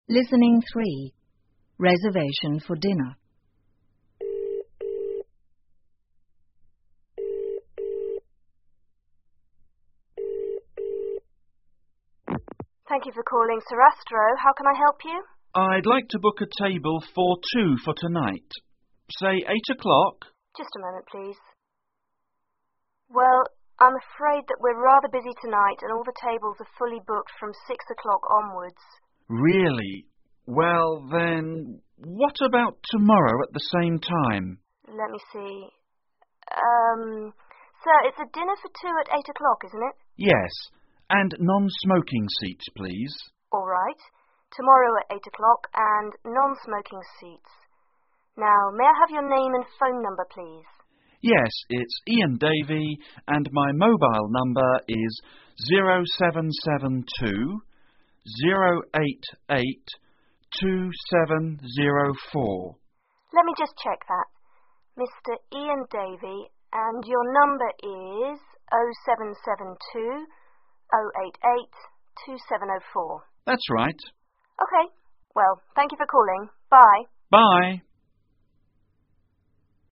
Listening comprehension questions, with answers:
请根据对话内容, 判断下面的句子是否正确,如果符合对话内容,请在T做记号,如果不符合,请在F做记号。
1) The customer would like to book a table for more than two.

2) The table are fully booked before 6 o'clock tonight.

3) The restaurant is only for non-smokers.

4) The customer can book for tomorrow.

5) The restaurant worker asked only the name of the customer.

请根据对话内容回答问题。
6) What time would the customer like to book a talbe?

下面是对话一开始的部分,请再听一次对话,在空格内填入遗漏的部分。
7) Customer: I'd like to book a table ______________________. Say 8 o'clock?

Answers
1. F
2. F
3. F
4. T
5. F
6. 8 o'clock
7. for two for tonight